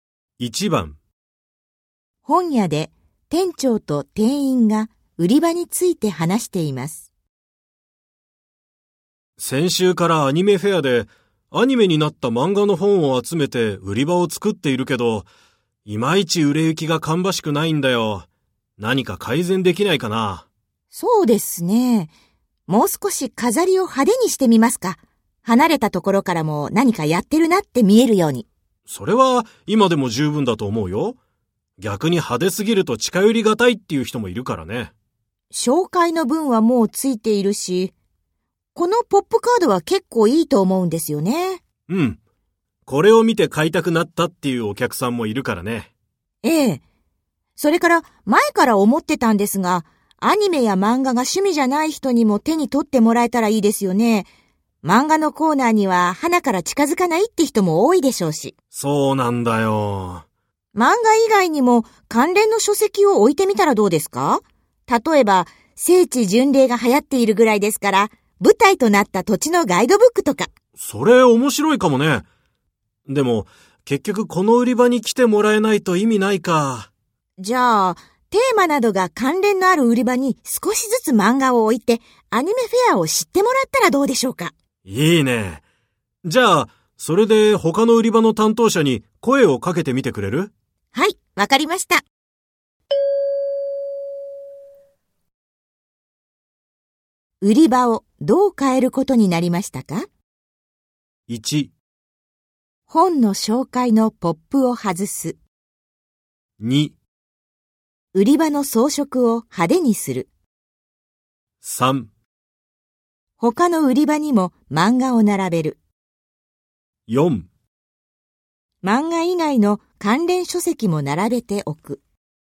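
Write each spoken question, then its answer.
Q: 売り場をどう変えることになりましたか?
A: 3: 他の売り場にも漫画を並べる。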